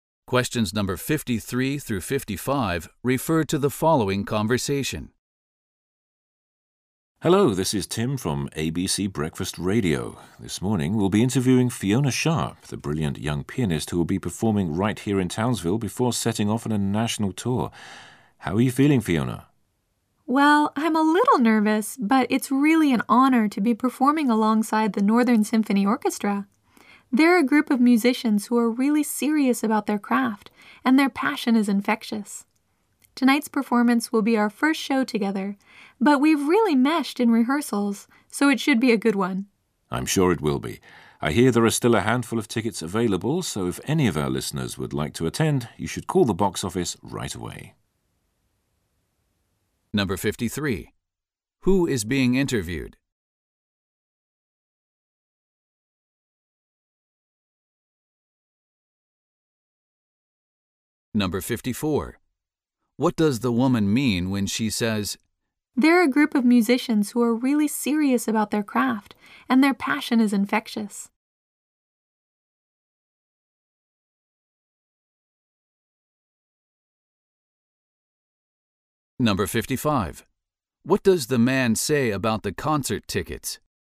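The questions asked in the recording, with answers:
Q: Who is being interviewed?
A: A pianist (Fiona Sharp)

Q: What does the man say about the concert tickets?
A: A few tickets are still available; listeners should call the box office right away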